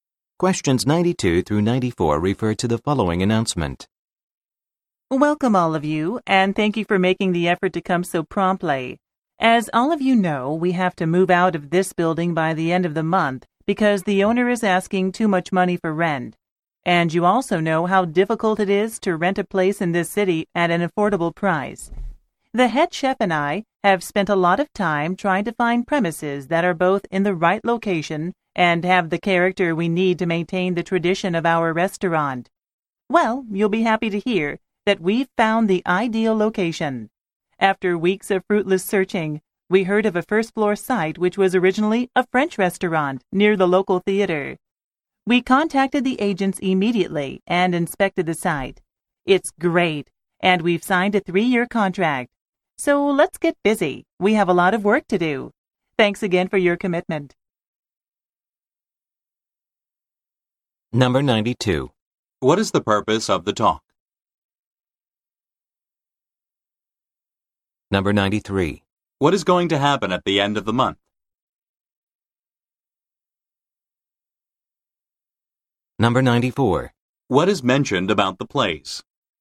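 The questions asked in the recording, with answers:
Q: What is the purpose of the talk?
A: To announce that a new location for the restaurant has been found

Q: What is going to happen at the end of the month?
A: They will move out of the building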